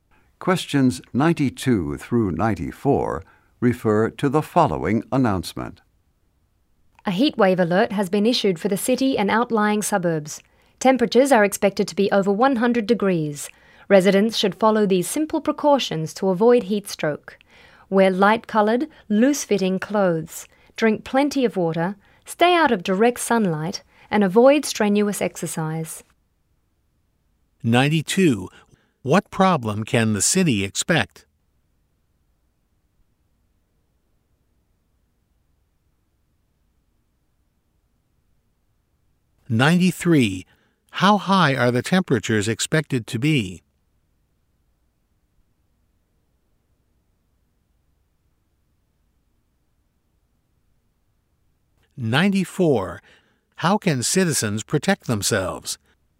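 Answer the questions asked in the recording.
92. A heat wave
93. Over 100 degrees
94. Wear light, loose clothes, drink water, stay out of the sun, avoid strenuous exercise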